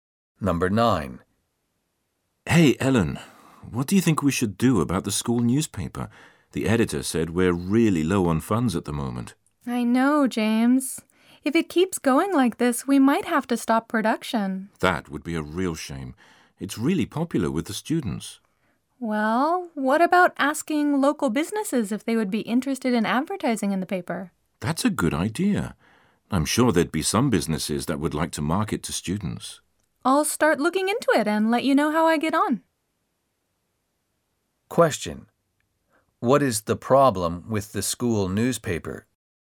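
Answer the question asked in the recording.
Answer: It is low on funds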